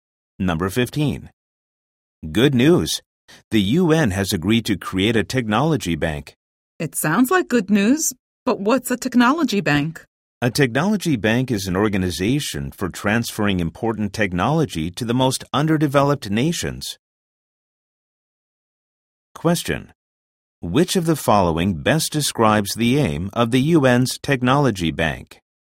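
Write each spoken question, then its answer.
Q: Which of the following best describes the aim of the UN's technology bank?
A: To transfer important technology to the most underdeveloped nations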